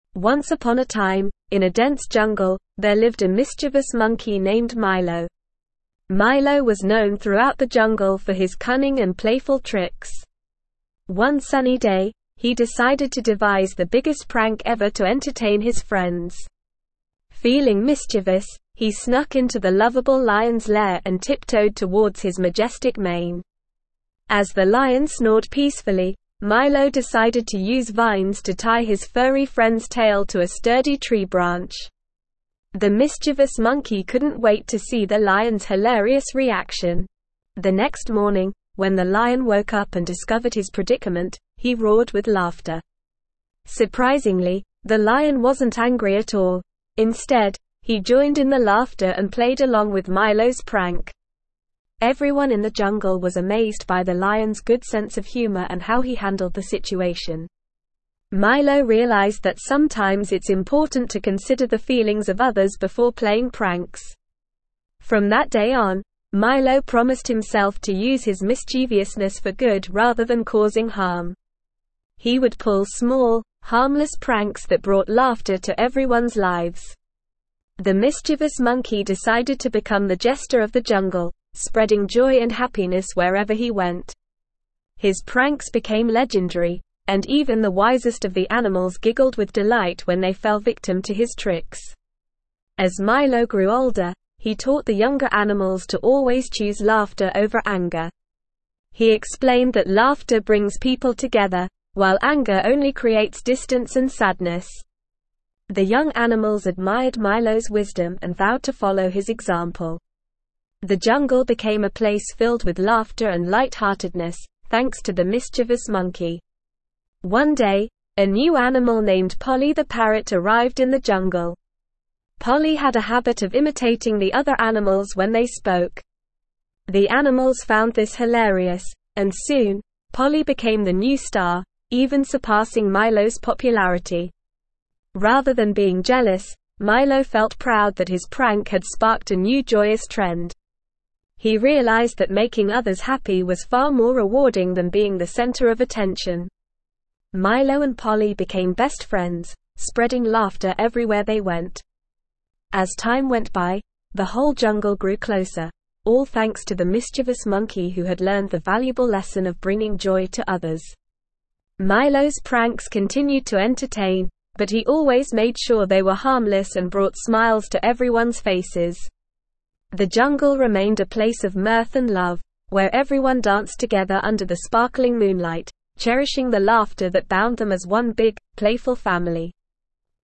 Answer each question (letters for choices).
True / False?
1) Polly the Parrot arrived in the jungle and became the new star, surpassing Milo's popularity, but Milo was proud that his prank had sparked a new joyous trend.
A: True

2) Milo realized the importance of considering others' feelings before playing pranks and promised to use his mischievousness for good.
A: True

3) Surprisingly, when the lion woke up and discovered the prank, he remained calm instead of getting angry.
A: False

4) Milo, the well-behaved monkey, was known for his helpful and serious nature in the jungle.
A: False

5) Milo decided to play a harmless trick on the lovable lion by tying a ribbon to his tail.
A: False

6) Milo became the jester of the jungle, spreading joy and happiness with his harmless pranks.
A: True

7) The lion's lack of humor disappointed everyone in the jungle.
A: False

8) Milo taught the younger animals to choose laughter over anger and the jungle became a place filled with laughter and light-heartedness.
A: True

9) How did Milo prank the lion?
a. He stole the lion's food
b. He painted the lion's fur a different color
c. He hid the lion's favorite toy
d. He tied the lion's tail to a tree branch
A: d

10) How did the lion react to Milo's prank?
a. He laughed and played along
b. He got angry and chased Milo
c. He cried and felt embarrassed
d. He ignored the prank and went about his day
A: a

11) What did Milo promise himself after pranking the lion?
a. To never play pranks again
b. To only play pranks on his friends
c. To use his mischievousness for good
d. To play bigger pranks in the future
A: c

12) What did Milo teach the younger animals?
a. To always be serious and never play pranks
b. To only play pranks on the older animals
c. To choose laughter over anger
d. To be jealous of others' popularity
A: c

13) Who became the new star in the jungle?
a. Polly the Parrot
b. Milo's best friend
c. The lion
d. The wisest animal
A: a

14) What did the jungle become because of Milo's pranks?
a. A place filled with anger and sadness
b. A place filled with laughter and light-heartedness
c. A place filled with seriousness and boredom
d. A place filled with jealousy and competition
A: b

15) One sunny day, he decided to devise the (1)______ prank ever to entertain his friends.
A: biggest

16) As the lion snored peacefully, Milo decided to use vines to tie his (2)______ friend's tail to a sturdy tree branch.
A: furry

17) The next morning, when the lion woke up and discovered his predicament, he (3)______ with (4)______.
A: roared

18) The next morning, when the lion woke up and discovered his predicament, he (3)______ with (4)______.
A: laughter

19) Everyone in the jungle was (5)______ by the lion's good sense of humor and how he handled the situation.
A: amazed

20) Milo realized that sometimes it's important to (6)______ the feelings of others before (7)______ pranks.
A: consider

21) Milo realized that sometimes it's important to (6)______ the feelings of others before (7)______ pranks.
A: playing

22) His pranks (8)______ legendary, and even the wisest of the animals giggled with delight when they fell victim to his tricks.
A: became

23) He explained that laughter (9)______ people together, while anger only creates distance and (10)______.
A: brings

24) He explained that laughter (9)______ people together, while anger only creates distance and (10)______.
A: sadness

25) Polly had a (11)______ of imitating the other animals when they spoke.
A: habit

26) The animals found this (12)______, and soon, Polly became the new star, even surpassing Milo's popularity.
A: hilarious

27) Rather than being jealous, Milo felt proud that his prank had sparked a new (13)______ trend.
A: joyous

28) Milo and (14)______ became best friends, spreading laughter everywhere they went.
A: Polly

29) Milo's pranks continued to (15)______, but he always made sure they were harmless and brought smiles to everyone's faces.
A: entertain

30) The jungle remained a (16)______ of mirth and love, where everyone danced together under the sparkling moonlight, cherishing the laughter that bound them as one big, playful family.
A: place

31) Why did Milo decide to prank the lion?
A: Milo decided to prank the lion to entertain his friends and to create the biggest prank ever.

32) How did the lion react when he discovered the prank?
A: The lion roared with laughter and played along with Milo's prank.

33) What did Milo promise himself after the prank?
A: Milo promised himself to use his mischievousness for good rather than causing harm.

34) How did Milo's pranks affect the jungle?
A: Milo's pranks brought laughter and joy to the jungle, creating a place filled with light-heartedness.

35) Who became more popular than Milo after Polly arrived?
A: Polly the Parrot became more popular than Milo after she arrived in the jungle.

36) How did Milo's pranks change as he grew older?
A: As Milo grew older, his pranks became harmless and focused on bringing smiles to everyone's faces.

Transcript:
Once upon a time, in a dense jungle, there lived a mischievous monkey named Milo. Milo was known throughout the jungle for his cunning and playful tricks. One sunny day, he decided to devise the biggest prank ever to entertain his friends. Feeling mischievous, he snuck into the lovable lion's lair and tiptoed towards his majestic mane. As the lion snored peacefully, Milo decided to use vines to tie his furry friend's tail to a sturdy tree branch. The mischievous monkey couldn't wait to see the lion's hilarious reaction!
The next morning, when the lion woke up and discovered his predicament, he roared with laughter. Surprisingly, the lion wasn't angry at all; instead, he joined in the laughter and played along with Milo's prank. Everyone in the jungle was amazed by the lion's good sense of humor and how he handled the situation. Milo realized that sometimes it's important to consider the feelings of others before playing pranks.
From that day on, Milo promised himself to use his mischievousness for good rather than causing harm. He would pull small, harmless pranks that brought laughter to everyone's lives. The mischievous monkey decided to become the jester of the jungle, spreading joy and happiness wherever he went. His pranks became legendary, and even the wisest of the animals giggled with delight when they fell victim to his tricks.
As Milo grew older, he taught the younger animals to always choose laughter over anger. He explained that laughter brings people together, while anger only creates distance and sadness. The young animals admired Milo's wisdom and vowed to follow his example. The jungle became a place filled with laughter and light-heartedness, thanks to the mischievous monkey.
One day, a new animal named Polly the Parrot arrived in the jungle. Polly had a habit of imitating the other animals when they spoke. The animals found this hilarious, and soon, Polly became the new star, even surpassing Milo's popularity. Rather than being jealous, Milo felt proud that his prank had sparked a new joyous trend. He realized that making others happy was far more rewarding than being the center of attention. Milo and Polly became best friends, spreading laughter everywhere they went.
As time went by, the whole jungle grew closer, all thanks to the mischievous monkey who had learned the valuable lesson of bringing joy to others. Milo's pranks continued to entertain, but he always made sure they were harmless and brought smiles to everyone's faces. The jungle remained a place of mirth and love, where everyone danced together under the sparkling moonlight, cherishing the laughter that bound them as one big, playful family.

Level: Level 4